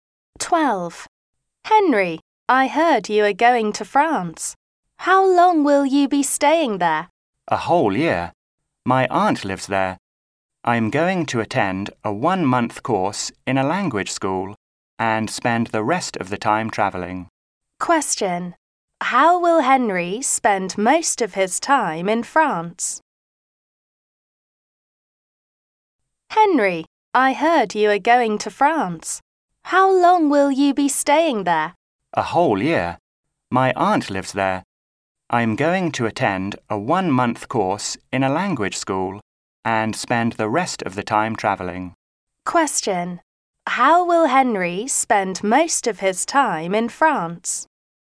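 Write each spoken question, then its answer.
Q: How will Henry spend most of his time in France?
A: Travelling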